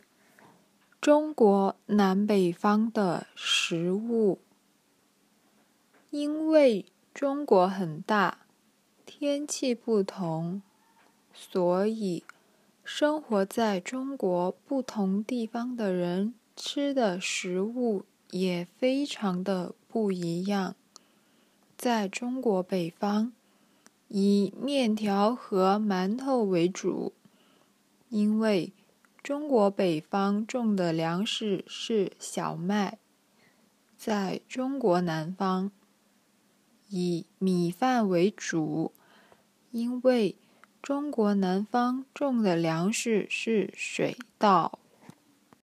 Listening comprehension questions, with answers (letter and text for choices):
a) 馒头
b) 米饭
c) 馒头和米饭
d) 馒头和面条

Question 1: 中国北方主要吃什么?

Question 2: 中国南方主要吃什么?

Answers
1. d) 馒头和面条
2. b) 米饭

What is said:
中国南北方的食物 因为中国很大,天气不同,所以生活在中国不同地方的人吃的食物也非常的不一样。 在中国北方,以面条和馒头为主,因为中国北方种的粮食是小麦;在中国南方,以米饭为主,因为中国南方种的粮食是水稻。

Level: intermediate